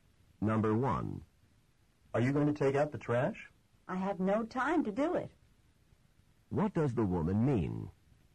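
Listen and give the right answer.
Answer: She won't take out the trash; she has no time.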